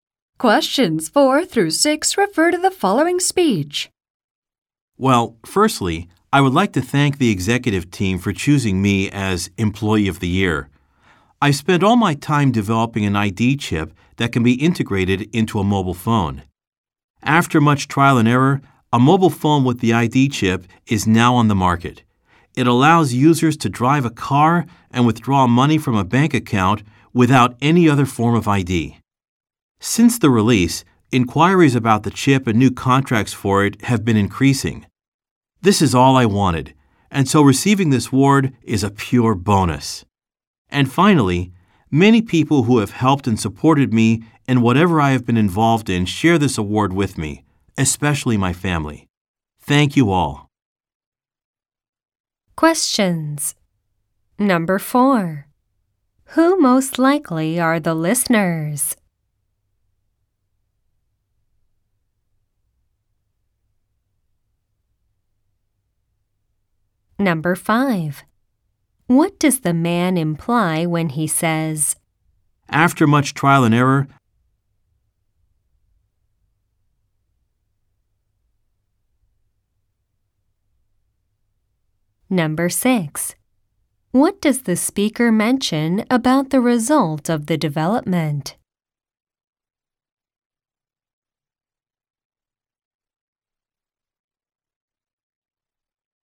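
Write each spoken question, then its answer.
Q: What does the speaker mention about the result of the development?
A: Inquiries about the chip and new contracts for it have been increasing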